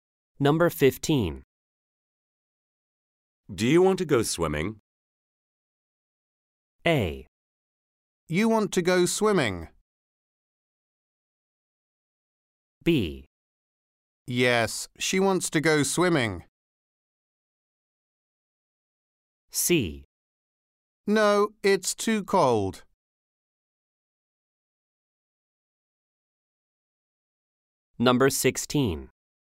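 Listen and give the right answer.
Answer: C: No, it's too cold.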